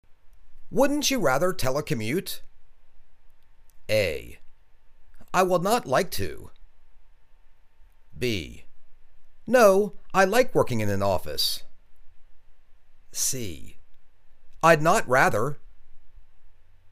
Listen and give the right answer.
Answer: No, I like working in an office.